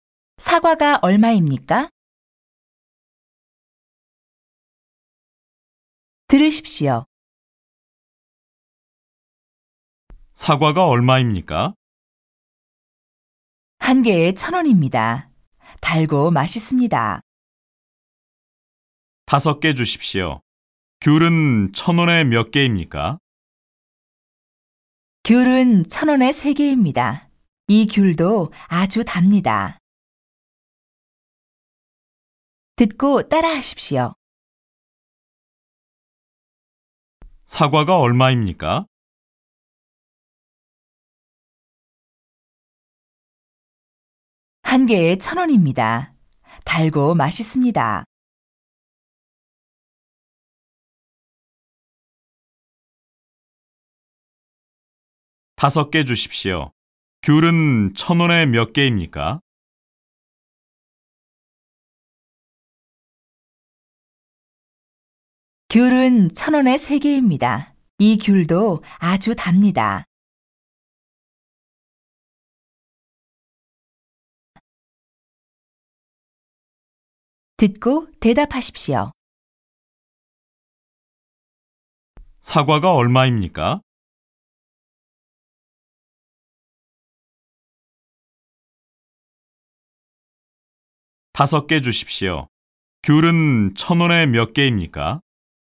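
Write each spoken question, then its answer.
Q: 사과가 얼마입니까?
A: 한 개에 1,000원입니다.

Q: 귤은 1,000원에 몇 개입니까?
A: 1,000원에 3개입니다.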